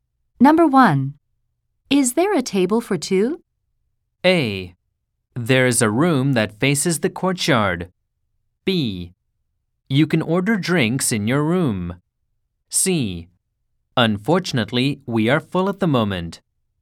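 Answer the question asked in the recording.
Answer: C: Unfortunately, we are full at the moment.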